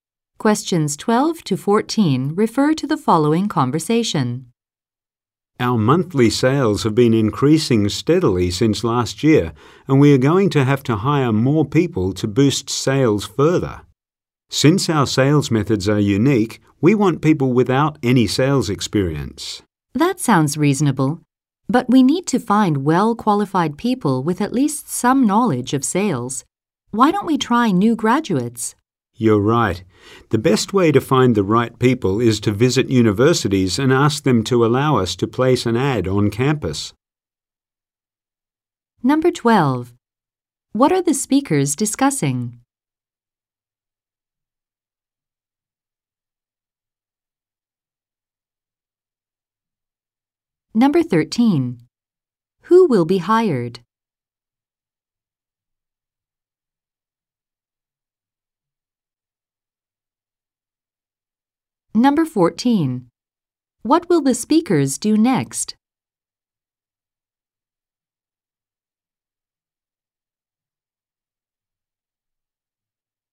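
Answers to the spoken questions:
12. Hiring more people to boost sales
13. New graduates
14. Visit universities to ask to place an ad on campus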